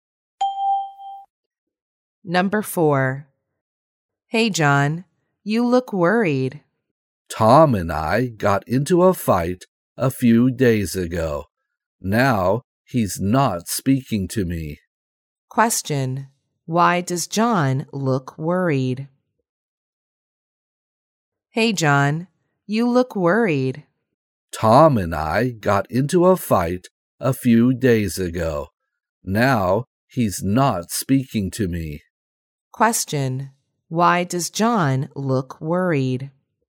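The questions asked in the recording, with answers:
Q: Why does John look worried?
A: He got into a fight with Tom, and now Tom isn't speaking to him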